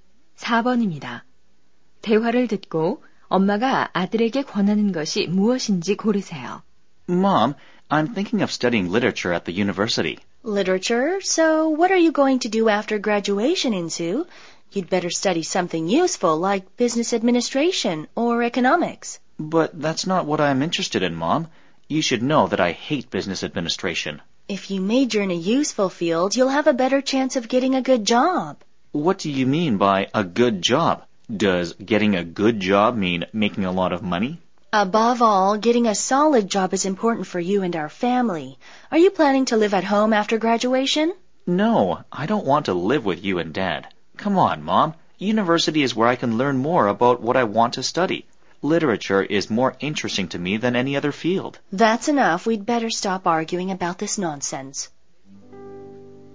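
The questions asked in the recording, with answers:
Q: 대화를 듣고 엄마가 아들에게 권하는 것이 무엇인지 고르세요.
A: 경영학이나 경제학 같은 실용적인 전공 공부하기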